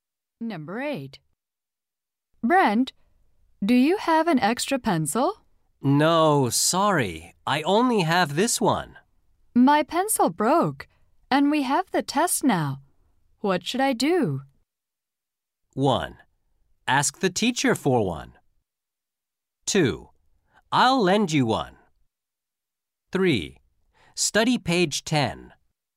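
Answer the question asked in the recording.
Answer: 1: Ask the teacher for one.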